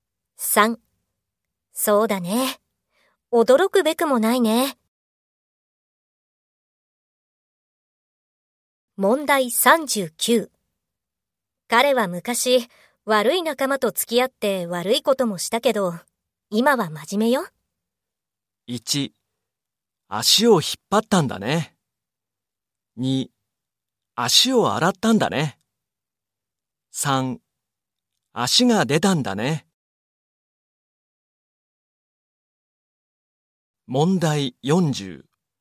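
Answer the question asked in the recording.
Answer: 2: 足を洗ったんだね。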